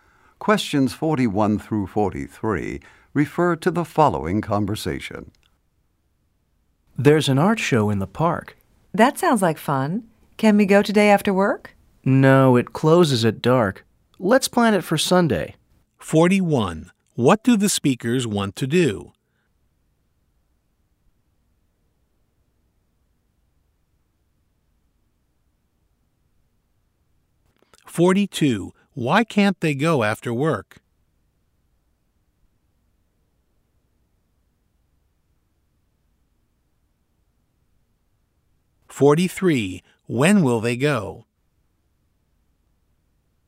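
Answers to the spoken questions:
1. Go to an art show in the park
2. It closes at dark
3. On Sunday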